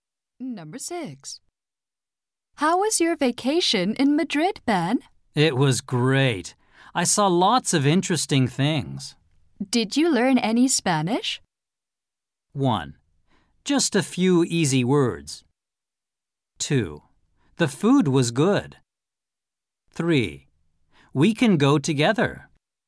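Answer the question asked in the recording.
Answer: 1: Just a few easy words.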